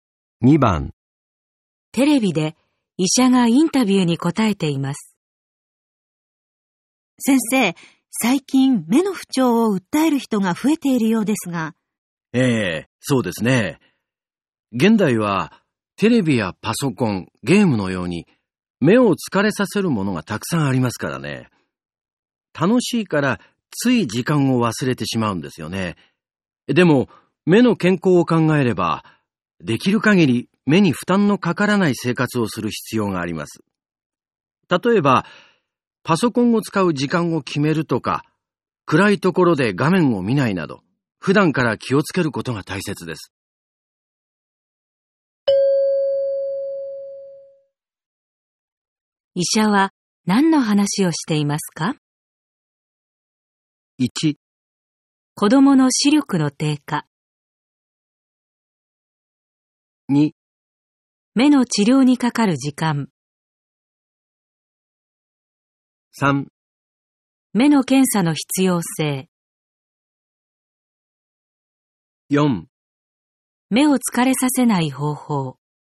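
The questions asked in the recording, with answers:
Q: 医者は何の話をしていますか?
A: 4: 目を疲れさせない方法。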